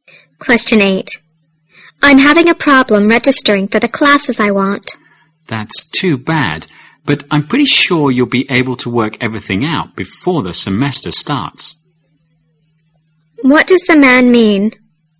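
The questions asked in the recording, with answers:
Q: What does the man mean?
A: The woman will sort out her registration problem before the semester starts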